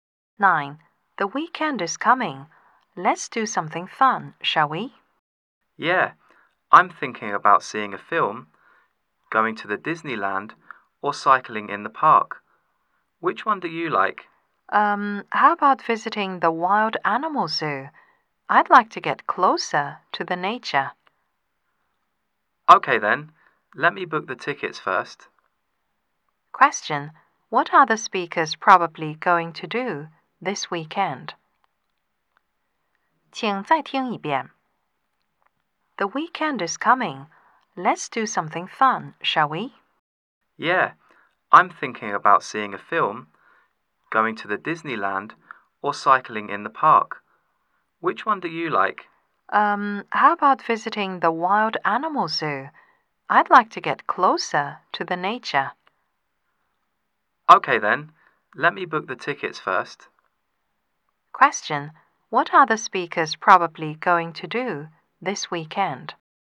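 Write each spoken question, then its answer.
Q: What are the speakers probably going to do this weekend?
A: Visit the wild animal zoo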